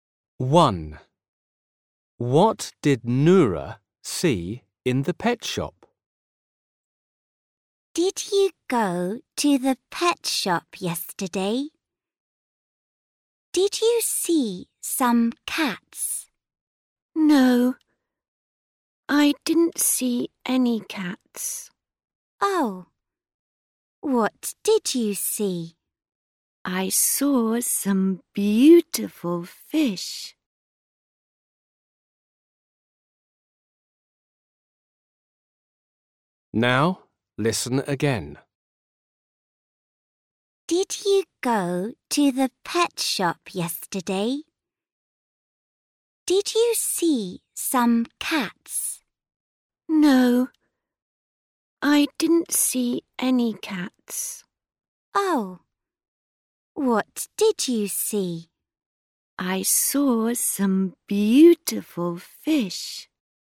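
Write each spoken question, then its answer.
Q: What did Noura see in the pet shop?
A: some beautiful fish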